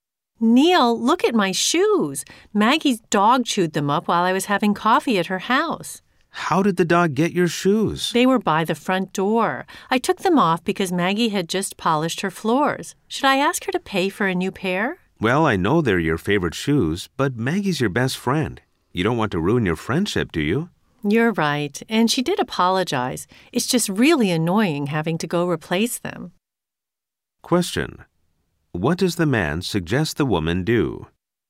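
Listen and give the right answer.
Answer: Not ask Maggie to pay for new shoes, so she won't ruin their friendship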